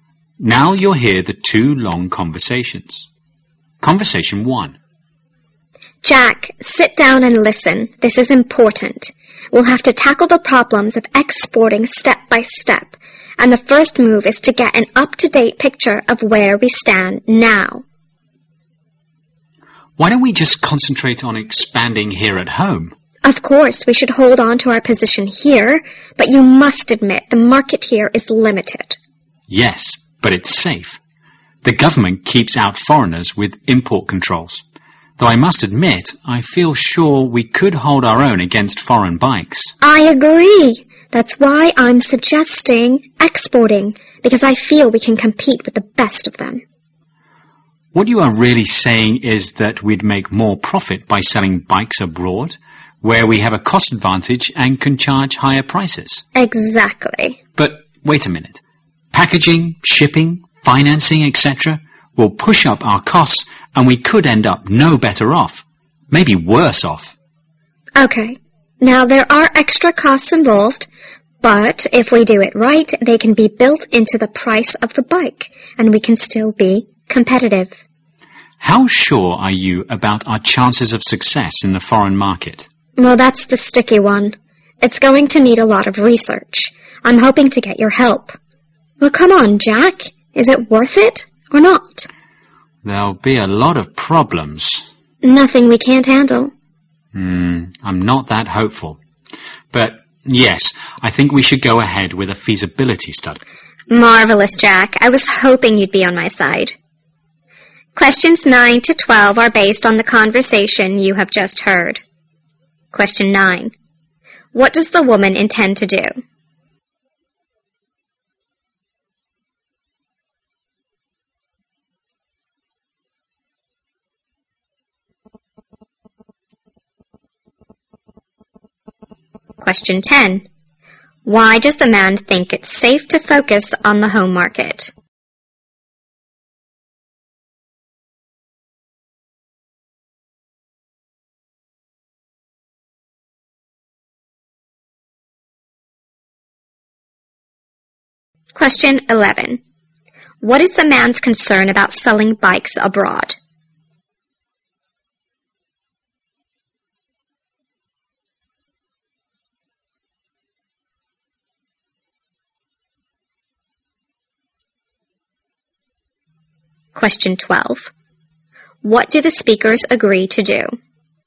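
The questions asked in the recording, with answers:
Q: What does the woman intend to do?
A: Export bikes and sell them abroad

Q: Why does the man think it's safe to focus on the home market?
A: Because the government uses import controls to keep out foreign competitors

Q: What is the man's concern about selling bikes abroad?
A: Extra costs like packaging, shipping and financing may push costs up and cancel out the profit

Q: What do the speakers agree to do?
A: Carry out a feasibility study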